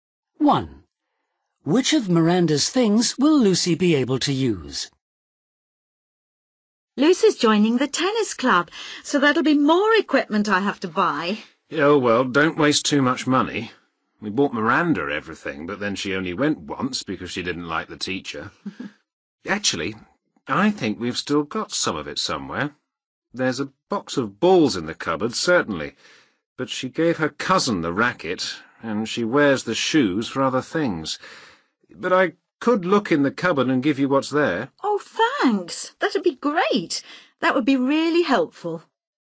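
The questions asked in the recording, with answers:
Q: Which of Miranda's things will Lucy be able to use?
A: the tennis balls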